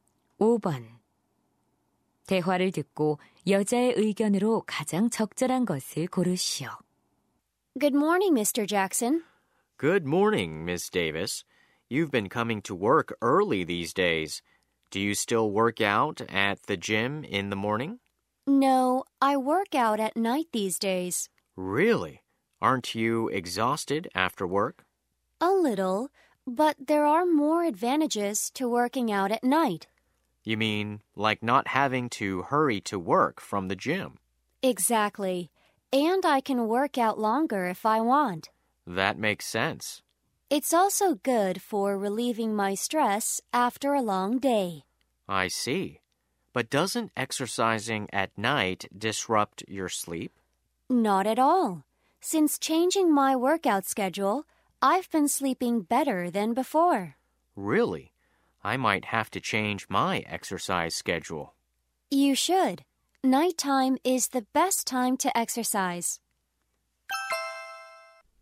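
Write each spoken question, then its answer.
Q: 대화를 듣고 여자의 의견으로 가장 적절한 것을 고르시오.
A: 밤에 운동하는 것이 가장 좋다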